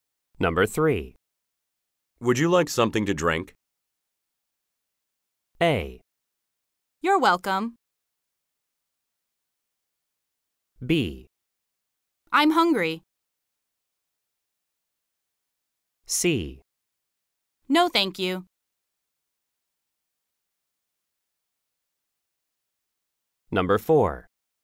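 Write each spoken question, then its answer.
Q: Would you like something to drink?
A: C: No, thank you.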